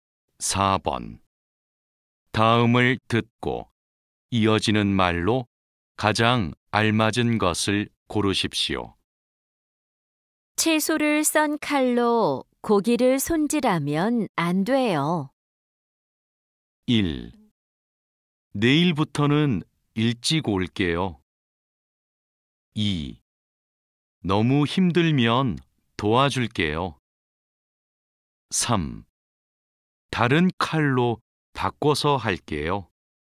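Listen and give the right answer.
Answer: 3: 다른 칼로 바꿔서 할게요.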